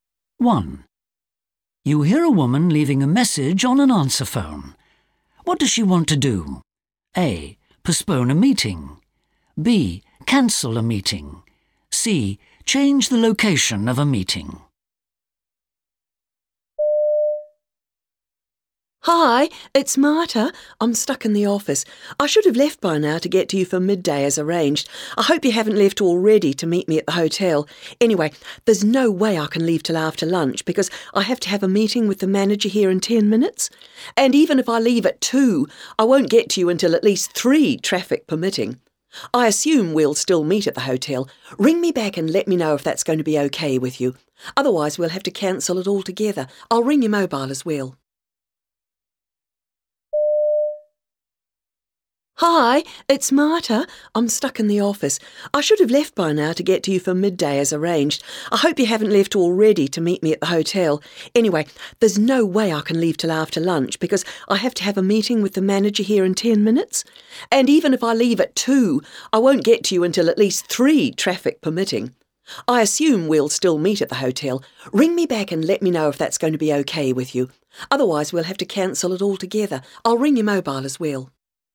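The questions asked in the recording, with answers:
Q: What does she want to do?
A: A: Postpone a meeting.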